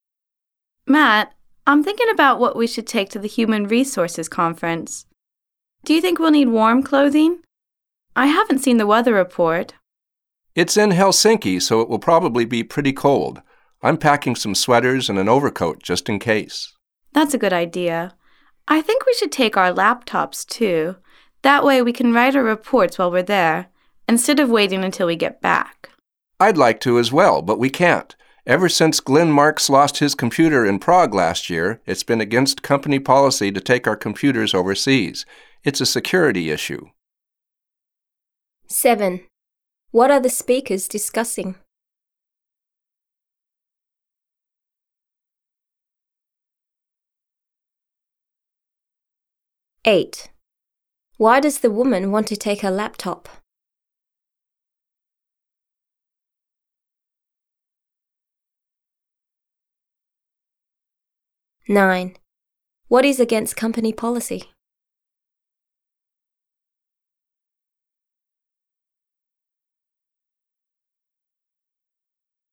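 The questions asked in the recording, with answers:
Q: What are the speakers discussing?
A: What to take to a Human Resources conference in Helsinki

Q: Why does the woman want to take her laptop?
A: To write their reports while at the conference

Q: What is against company policy?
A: Taking company computers overseas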